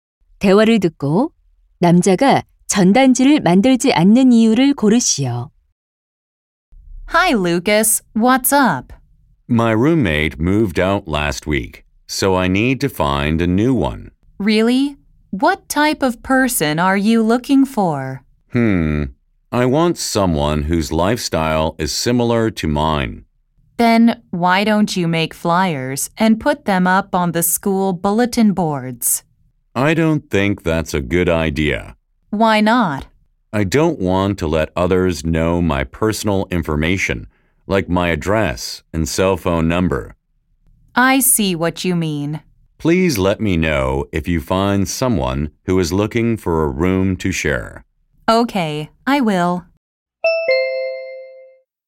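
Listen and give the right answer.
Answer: 주소와 휴대전화 번호 같은 개인 정보를 남에게 알리고 싶지 않아서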